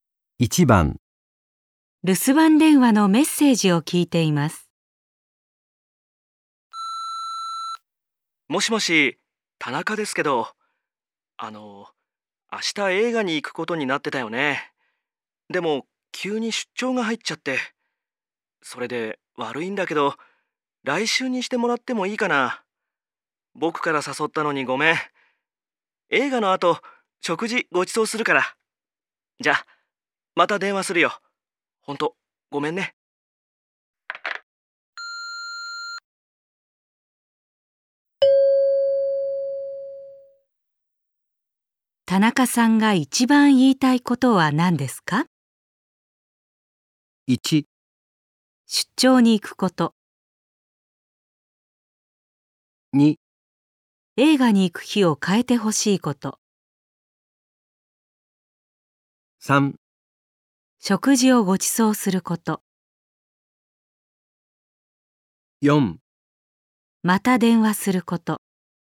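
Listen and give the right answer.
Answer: 2: 映画に行く日を変えてほしいこと。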